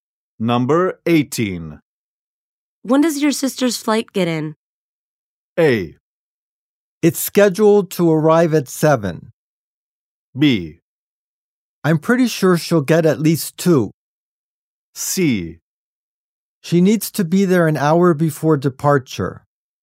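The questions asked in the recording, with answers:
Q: When does your sister's flight get in?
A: A: It's scheduled to arrive at 7.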